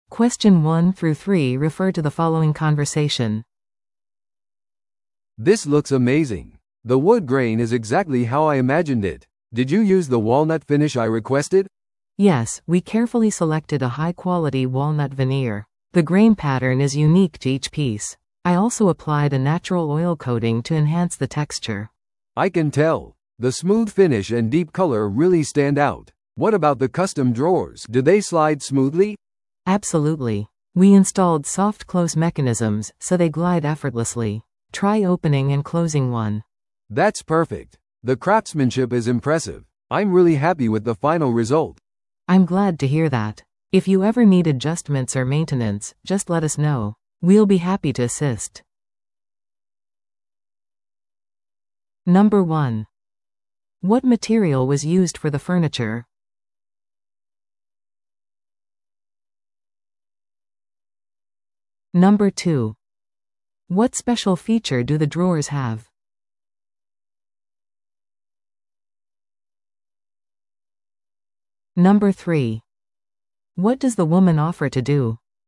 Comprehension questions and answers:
Listen to the audio below and answer the questions.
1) What material was used for the furniture?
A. オーク材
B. ウォールナット材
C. マホガニー材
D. メープル材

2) What special feature do the drawers have?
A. ロック機能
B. ソフトクローズ機能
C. 隠し収納スペース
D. ガラスパネル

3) What does the woman offer to do?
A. 家具の調整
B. 将来的なメンテナンスの提供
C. 仕上げの変更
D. 割引の提供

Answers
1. B
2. B
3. B

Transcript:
A: "This looks amazing. The wood grain is exactly how I imagined it. Did you use the walnut finish I requested?"
B: "Yes, we carefully selected a high-quality walnut veneer. The grain pattern is unique to each piece. I also applied a natural oil coating to enhance the texture."
A: "I can tell. The smooth finish and deep color really stand out. What about the custom drawers? Do they slide smoothly?"
B: "Absolutely. We installed soft-close mechanisms, so they glide effortlessly. Try opening and closing one."
A: "That's perfect. The craftsmanship is impressive. I'm really happy with the final result."
B: "I'm glad to hear that. If you ever need adjustments or maintenance, just let us know. We'll be happy to assist."

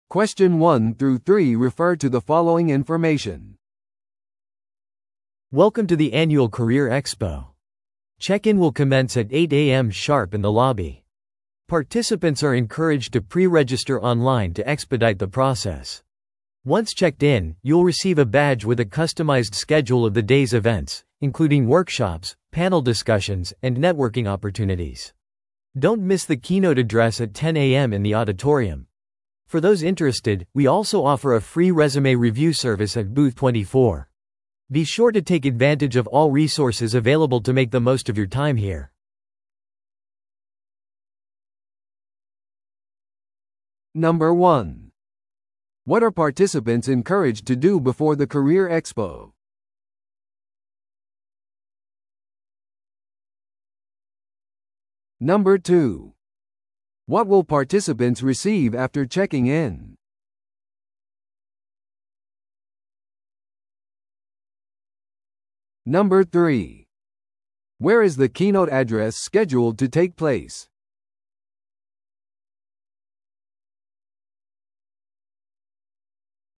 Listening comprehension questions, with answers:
Listen to the audio below and answer the questions.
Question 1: What are participants encouraged to do before the Career Expo?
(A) 登録料を支払う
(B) オンラインで事前登録する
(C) 履歴書を印刷する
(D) スピーチを準備する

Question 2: What will participants receive after checking in?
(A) 会場の地図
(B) 無料ランチ券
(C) スケジュール入りのバッジ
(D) 求人リスト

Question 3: Where is the keynote address scheduled to take place?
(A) ロビーで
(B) 24番ブースで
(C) 会議室で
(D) 講堂で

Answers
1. B
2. C
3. D

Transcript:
Welcome to the annual Career Expo! Check-in will commence at 8am sharp in the lobby. Participants are encouraged to pre-register online to expedite the process. Once checked in, you'll receive a badge with a customized schedule of the day's events, including workshops, panel discussions, and networking opportunities. Don't miss the keynote address at 10am in the auditorium. For those interested, we also offer a free resume review service at booth 24. Be sure to take advantage of all resources available to make the most of your time here.

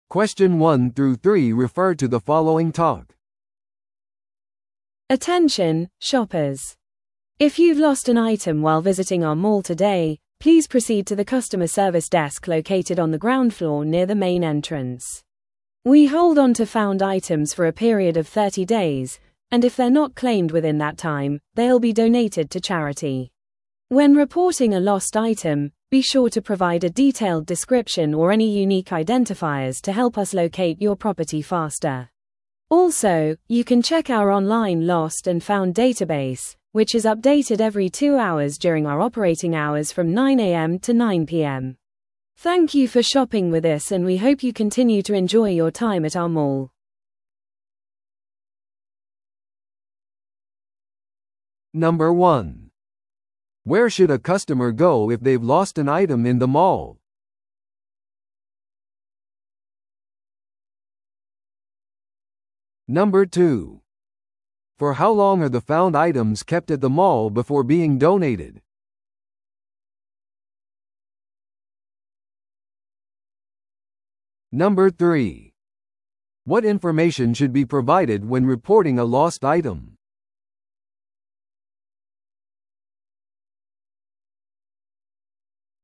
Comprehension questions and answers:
Listen to the audio below and answer the questions.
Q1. Where should a customer go if they've lost an item in the mall?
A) セキュリティオフィス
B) カスタマーサービスデスク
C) インフォメーションキオスク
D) オンラインの遺失物セクション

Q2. For how long are the found items kept at the mall before being donated?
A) 14日間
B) 30日間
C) 45日間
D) 60日間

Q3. What information should be provided when reporting a lost item?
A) 購入証明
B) 写真付きID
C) 詳細な説明または特有の特徴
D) 目撃者の証言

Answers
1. B
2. B
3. C

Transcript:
Attention, shoppers! If you've lost an item while visiting our mall today, please proceed to the customer service desk located on the ground floor near the main entrance. We hold onto found items for a period of 30 days, and if they're not claimed within that time, they'll be donated to charity. When reporting a lost item, be sure to provide a detailed description or any unique identifiers to help us locate your property faster. Also, you can check our online lost-and-found database, which is updated every 2 hours during our operating hours from 9am to 9pm. Thank you for shopping with us and we hope you continue to enjoy your time at our mall.

